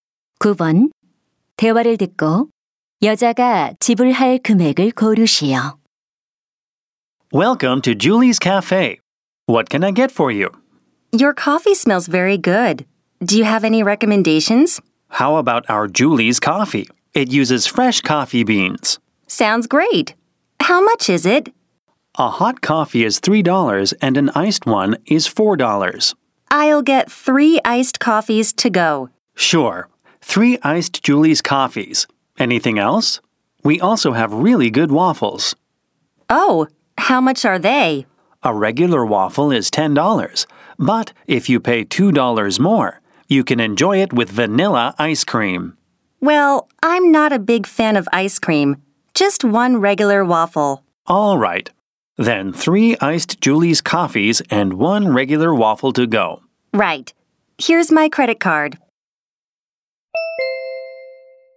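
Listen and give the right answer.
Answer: 22달러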